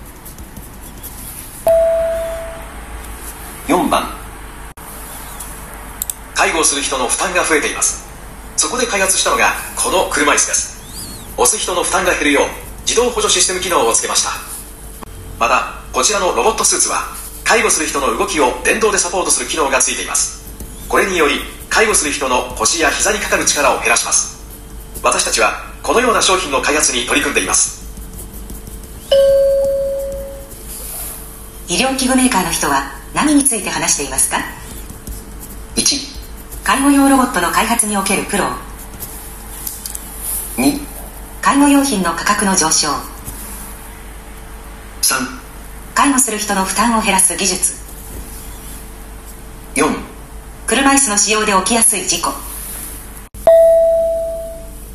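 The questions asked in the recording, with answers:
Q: 医療器具メーカーの人は何について話していますか?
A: 3: 介護する人の負担を減らす技術。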